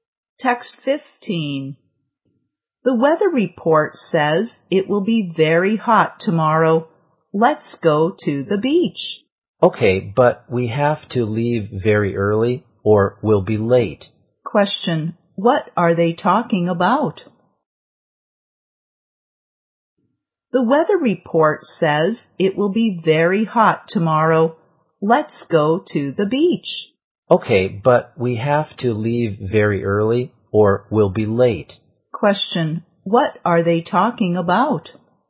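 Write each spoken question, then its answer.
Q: Question, what are they talking about?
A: Going to the beach tomorrow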